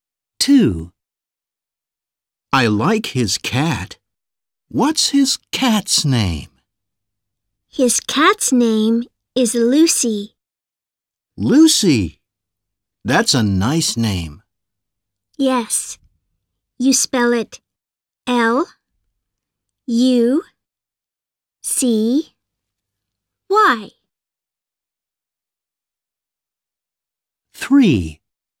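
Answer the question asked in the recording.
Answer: Lucy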